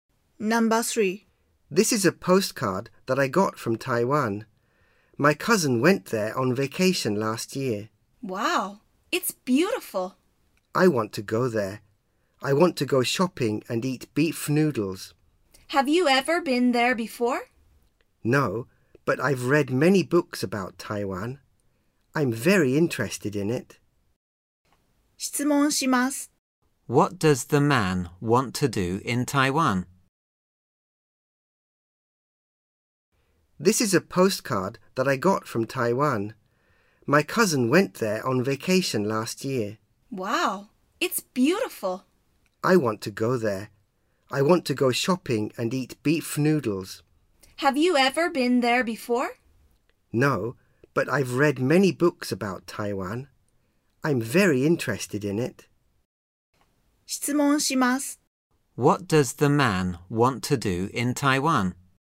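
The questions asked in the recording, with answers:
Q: What does the man want to do in Taiwan?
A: Go shopping and eat beef noodles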